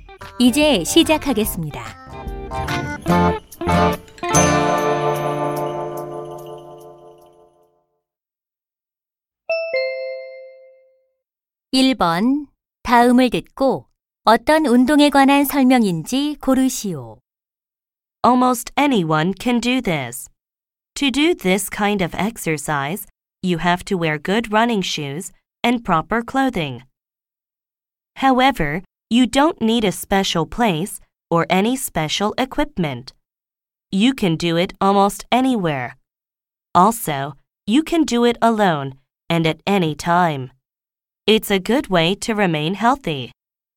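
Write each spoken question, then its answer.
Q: 다음을 듣고 어떤 운동에 관한 설명인지 고르시오.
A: 조깅(달리기)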